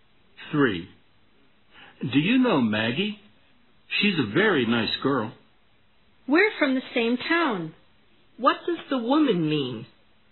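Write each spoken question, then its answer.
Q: What does the woman mean?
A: She knows Maggie; they are from the same town.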